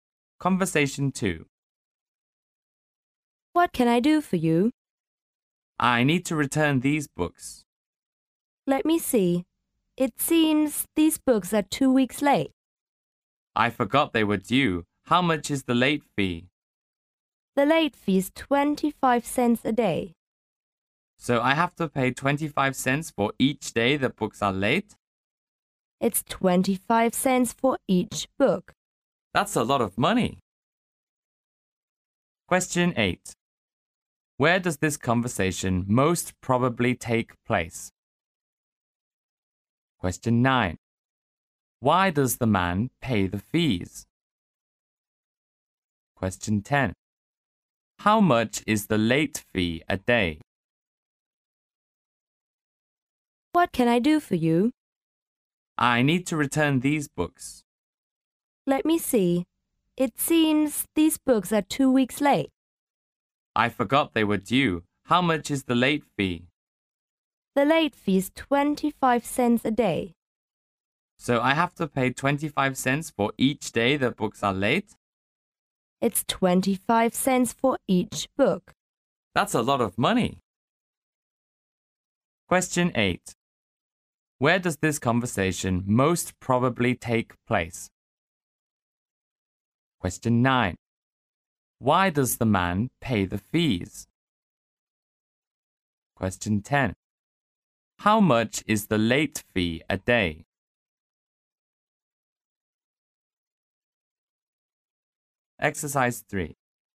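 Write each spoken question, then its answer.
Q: Where does this conversation most probably take place?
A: In a library

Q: Why does the man pay the fees?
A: His books are two weeks late

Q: How much is the late fee a day?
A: 25 cents for each book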